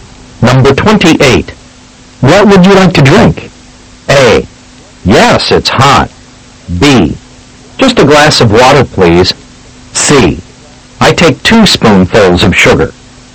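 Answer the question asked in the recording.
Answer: B: Just a glass of water, please.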